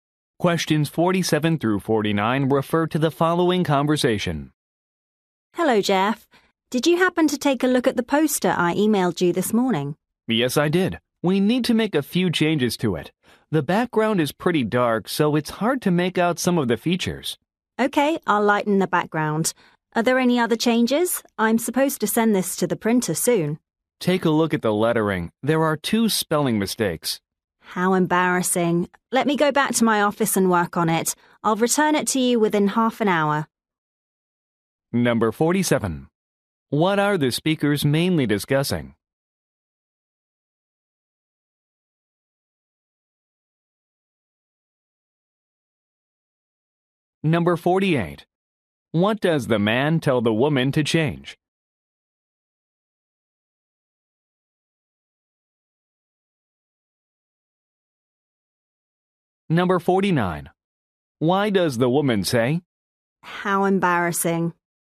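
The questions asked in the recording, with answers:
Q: What are the speakers mainly discussing?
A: A poster

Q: What does the man tell the woman to change?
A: Lighten the background and fix spelling mistakes

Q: Why does the woman say?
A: She is embarrassed about the spelling mistakes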